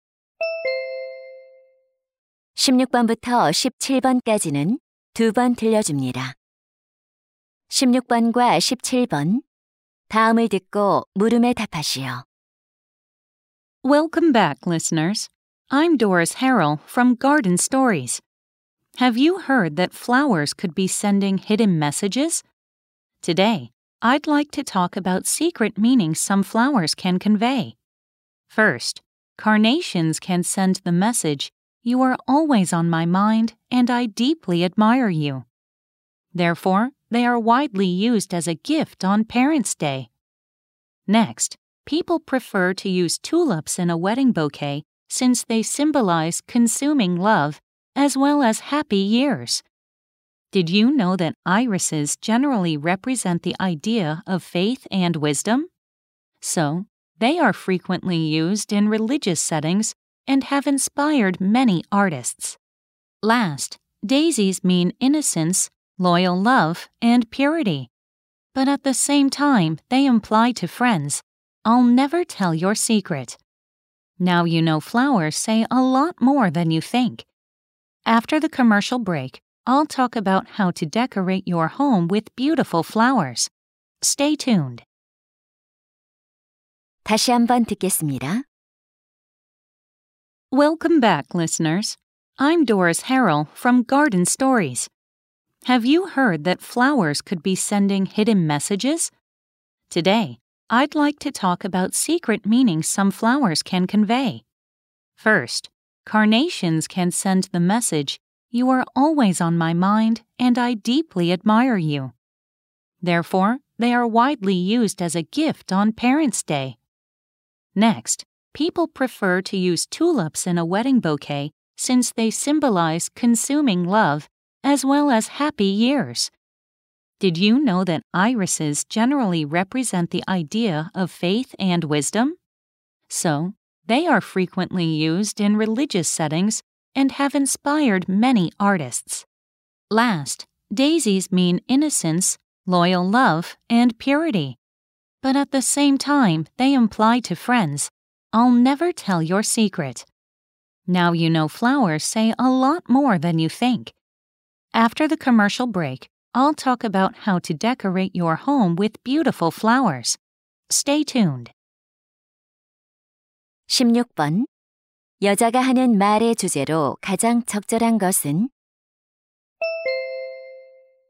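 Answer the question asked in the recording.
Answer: 꽃이 전하는 숨은 의미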